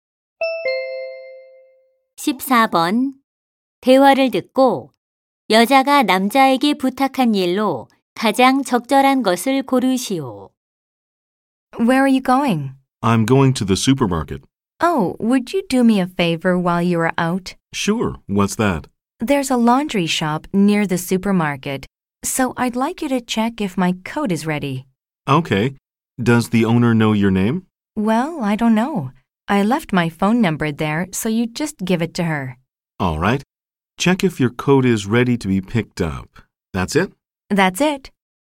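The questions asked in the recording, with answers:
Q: 대화를 듣고 여자가 남자에게 부탁한 일로 가장 적절한 것을 고르시오.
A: 세탁소에서 코트가 준비됐는지 확인하기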